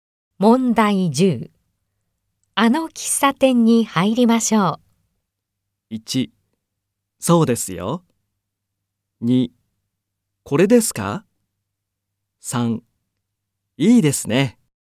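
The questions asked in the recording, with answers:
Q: あの喫茶店に入りましょう。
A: 3: いいですね。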